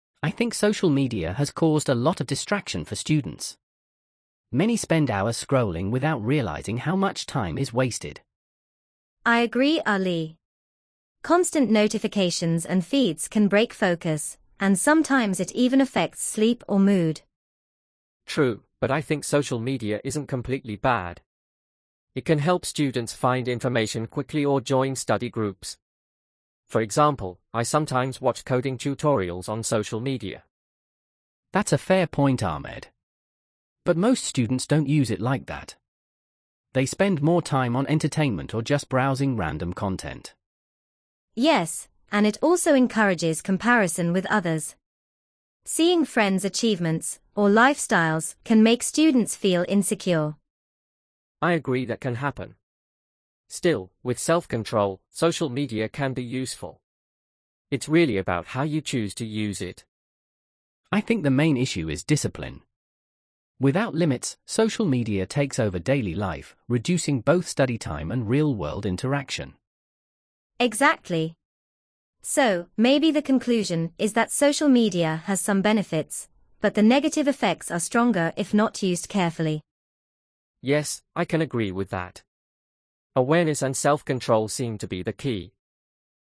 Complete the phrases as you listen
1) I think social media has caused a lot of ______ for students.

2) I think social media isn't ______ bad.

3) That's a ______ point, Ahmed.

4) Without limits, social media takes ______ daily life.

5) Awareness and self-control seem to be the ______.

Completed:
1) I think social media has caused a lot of distraction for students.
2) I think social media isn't completely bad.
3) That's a fair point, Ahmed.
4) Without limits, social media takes over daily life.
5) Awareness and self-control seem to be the key.

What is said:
Ali:
"I think social media has caused a lot of distraction for students. Many spend hours scrolling without realizing how much time is wasted."
"I agree, Ali. Constant notifications and feeds can break focus, and sometimes it even affects sleep or mood."
Ahmed:
"True, but I think social media isn't completely bad. It can help students find information quickly or join study groups. For example, I sometimes watch coding tutorials on social media."
Ali:
"That's a fair point, Ahmed. But most students don't use it like that. They spend more time on entertainment or just browsing random content."
"Yes, and it also encourages comparison with others. Seeing friends' achievements or lifestyles can make students feel insecure."
Ahmed:
"I agree that can happen. Still, with self-control, social media can be useful. It's really about how you choose to use it."
Ali:
"I think the main issue is discipline. Without limits, social media takes over daily life, reducing both study time and real-world interaction."
"Exactly. So, maybe the conclusion is that social media has some benefits, but the negative effects are stronger if not used carefully."
Ahmed:
"Yes, I can agree with that. Awareness and self-control seem to be the key."
Perfect! "Awareness and self-control seem to be the key."